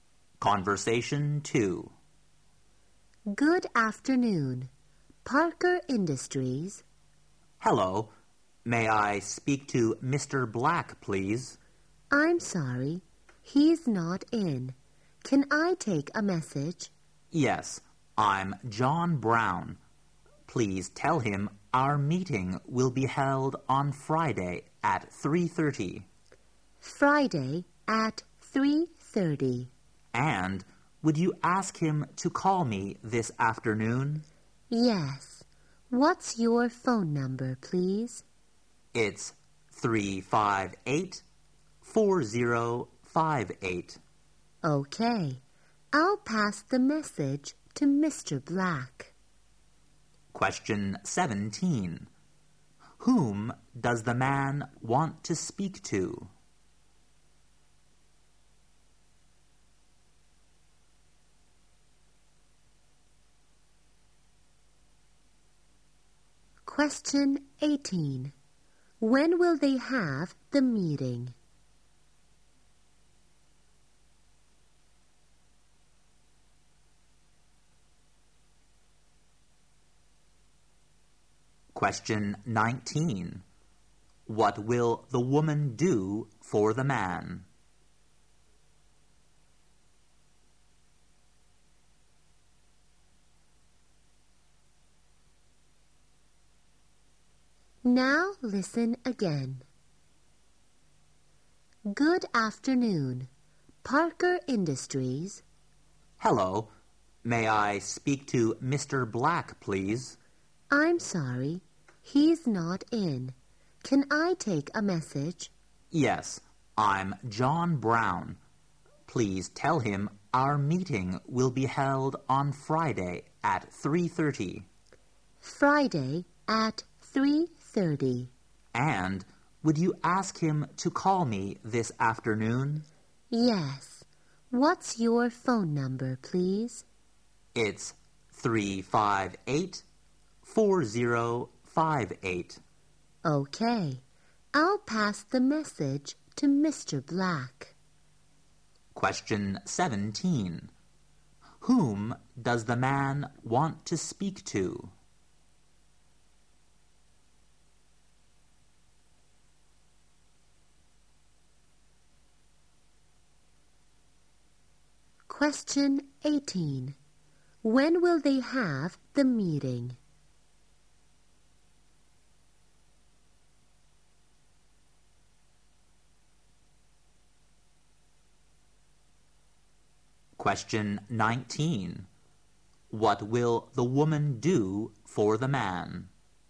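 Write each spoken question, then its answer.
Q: Whom does the man want to speak to?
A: Mr. Black.

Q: When will they have the meeting?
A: On Friday at 3:30.

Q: What will the woman do for the man?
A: Pass his message to Mr. Black.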